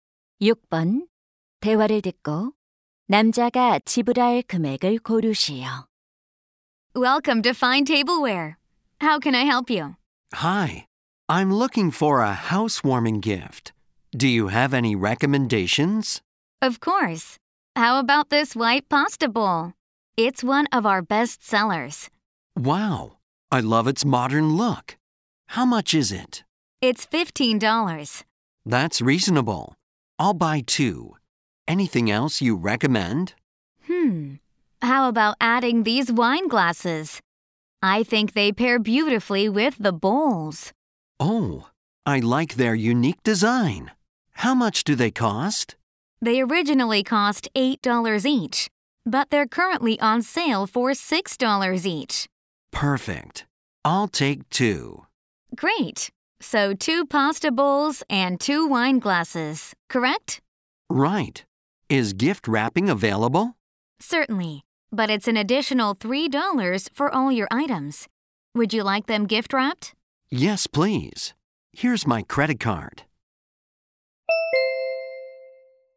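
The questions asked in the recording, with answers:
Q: 대화를 듣고 남자가 지불할 금액을 고르시오.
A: $45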